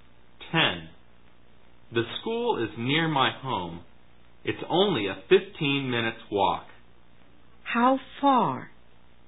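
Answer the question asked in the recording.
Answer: A 15-minute walk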